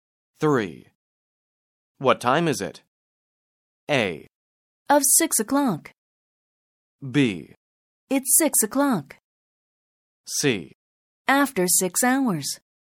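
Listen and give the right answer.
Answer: B: It's 6 o'clock.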